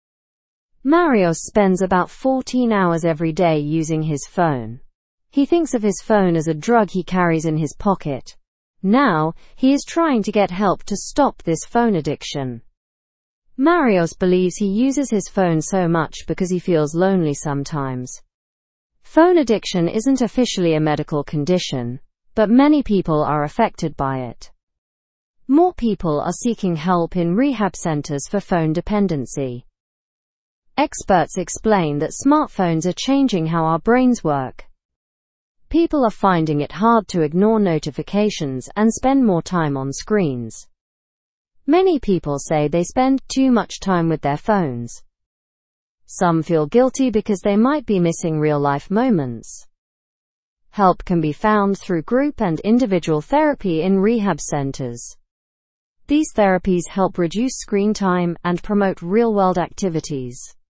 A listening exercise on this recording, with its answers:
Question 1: How many hours does Marios spend on his phone each day?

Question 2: What does Marios compare his phone to?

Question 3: Why is Marios seeking therapy?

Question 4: What do experts say about smartphones?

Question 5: What do many individuals report about phone usage?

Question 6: Where is help available for phone dependency?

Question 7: What do therapies in rehab centers encourage?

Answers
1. He spends about 14 hours daily.
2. He compares it to having a drug in his pocket.
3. He wants to overcome his phone addiction.
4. They are changing our brain chemistry.
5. They report spending too much time on their phones.
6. Help is available in rehab centers.
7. They encourage real-world interactions.

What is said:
Marios spends about 14 hours every day using his phone. He thinks of his phone as a drug he carries in his pocket. Now, he is trying to get help to stop this phone addiction. Marios believes he uses his phone so much because he feels lonely sometimes.
Phone addiction isn't officially a medical condition, but many people are affected by it. More people are seeking help in rehab centers for phone dependency. Experts explain that smartphones are changing how our brains work. People are finding it hard to ignore notifications and spend more time on screens.
Many people say they spend too much time with their phones. Some feel guilty because they might be missing real-life moments. Help can be found through group and individual therapy in rehab centers. These therapies help reduce screen time and promote real-world activities.

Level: Level 2